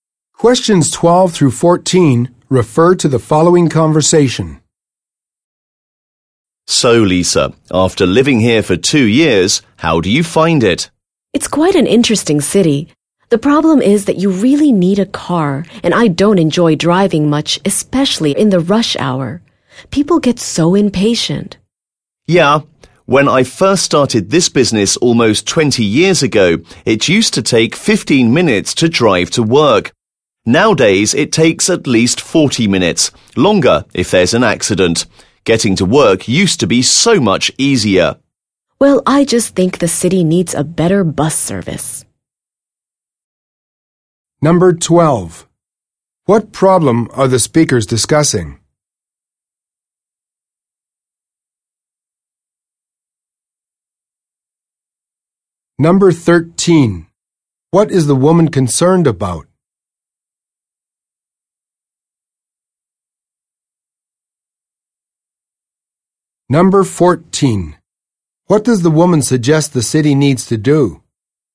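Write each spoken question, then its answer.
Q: What problem are the speakers discussing?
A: Traffic and long commutes in the city

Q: What is the woman concerned about?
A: Needing a car and driving in rush hour

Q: What does the woman suggest the city needs to do?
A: Provide a better bus service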